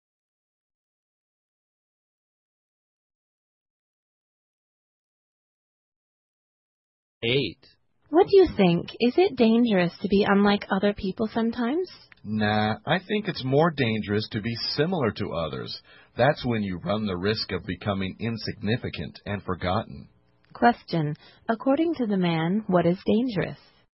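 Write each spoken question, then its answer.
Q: According to the man, what is dangerous?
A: Being similar to others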